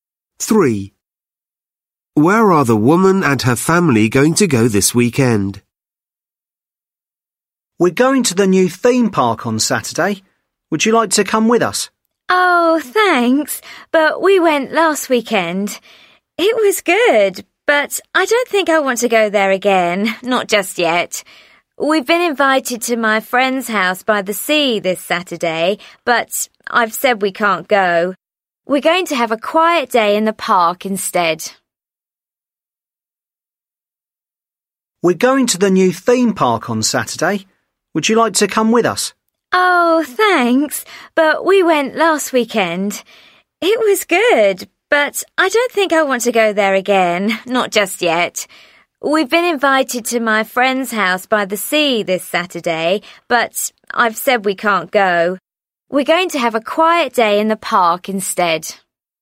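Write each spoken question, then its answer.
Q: Where are the woman and her family going to go this weekend?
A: To the park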